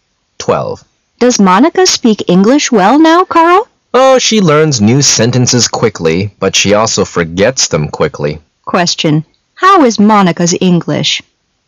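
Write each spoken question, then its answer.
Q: How is Monica's English?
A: She learns new sentences quickly but forgets them quickly.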